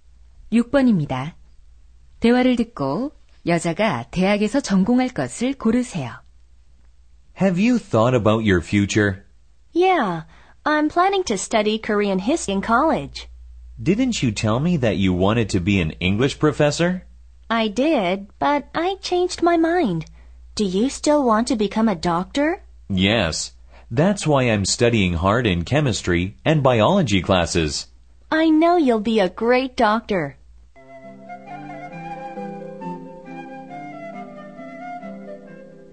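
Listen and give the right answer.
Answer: 한국사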